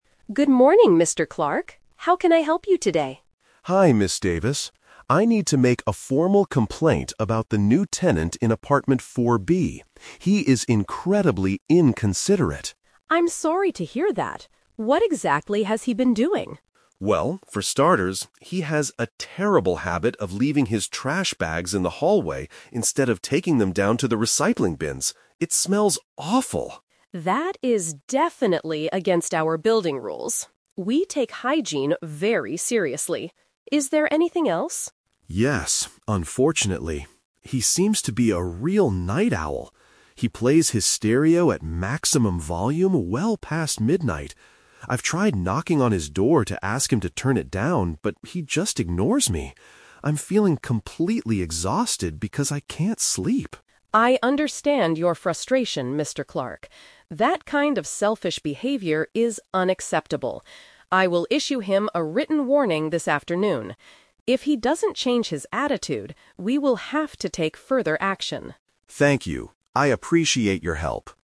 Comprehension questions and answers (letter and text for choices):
Listen to a conversation between a resident and a building manager. For each question, choose the correct answer A, B, or (C).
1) What is the resident's FIRST complaint about his neighbor?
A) He refuses to recycle his glass bottles.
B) He never cleans the inside of his apartment.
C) He puts his garbage in the wrong place.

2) How did Mr. Clark try to solve the noise problem himself?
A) He turned up his own stereo to maximum volume.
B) He tried to speak to the neighbor directly.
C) He called the local police department for help.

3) What will the building manager do NEXT?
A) Send an official letter to the rule-breaker.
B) Force the neighbor to move out of the building.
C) Move Mr. Clark to a much quieter apartment.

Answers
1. C) He puts his garbage in the wrong place.
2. B) He tried to speak to the neighbor directly.
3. A) Send an official letter to the rule-breaker.

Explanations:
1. Mr. Clark says the neighbor leaves "his trash bags in the hallway instead of taking them down to the recycling bins." The phrase "garbage in the wrong place" is a paraphrase for leaving trash bags in the hallway.
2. Mr. Clark says, "I've tried knocking on his door to ask him to turn it down." Knocking on a door to ask someone something means speaking to them directly.
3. Ms. Davis promises to "issue him a written warning this afternoon." An "official letter" is a B1-level synonym for a written warning.

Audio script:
Ms. Davis: Good morning, Mr. Clark. How can I help you today?
Mr. Davis. I need to make a formal complaint about the new tenant in apartment 4(B) He is incredibly inconsiderate.
Ms. Davis: I'm sorry to hear that. What exactly has he been doing?
Mr. Clark: Well, for starters, he has a terrible habit of leaving his trash bags in the hallway instead of taking them down to the recycling bins. It smells awful.
Davis: That is definitely against our building rules. We take hygiene very seriously. Is there anything else?
Mr. Clark: Yes, unfortunately. He seems to be a real night owl. He plays his stereo at maximum volume well past midnight. I've tried knocking on his door to ask him to turn it down, but he just ignores me. I'm feeling completely exhausted because I can't sleep.
Davis: I understand your frustration, Mr. Clark. That kind of selfish behavior is unacceptable. I will issue him a written warning this afternoon. If he doesn't change his attitude, we will have to take further action.